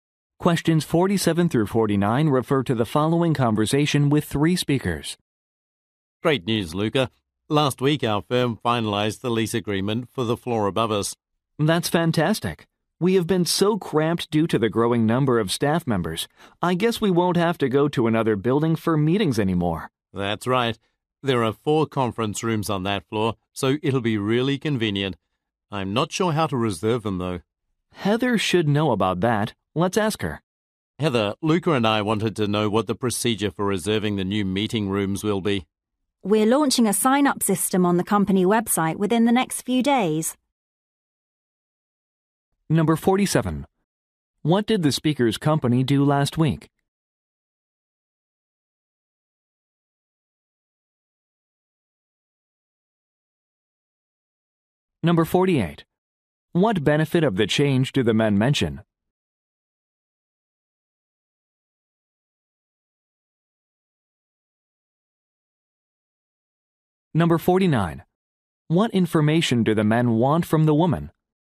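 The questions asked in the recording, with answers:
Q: What did the speaker's company do last week?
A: Signed a lease for the floor above them

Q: What benefit of the change do the men mention?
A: They won't have to go to another building for meetings

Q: What information do the men want from the woman?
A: How to reserve the new meeting rooms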